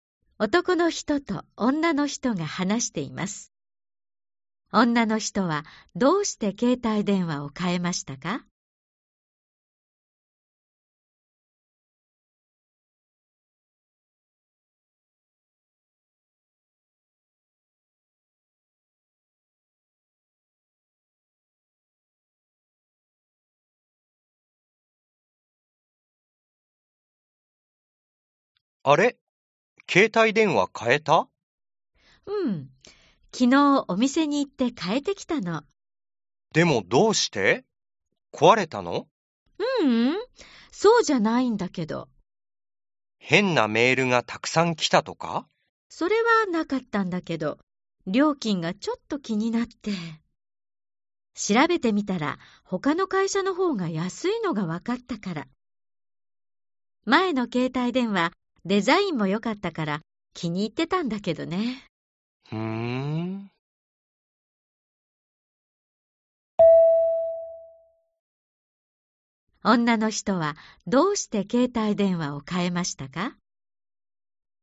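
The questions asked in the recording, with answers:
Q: 女の人はどうして携帯電話を変えましたか?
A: 他の会社の方が料金が安かったから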